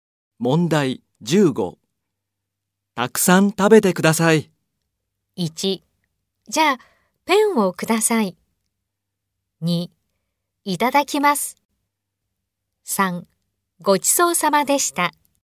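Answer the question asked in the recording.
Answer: 2: いただきます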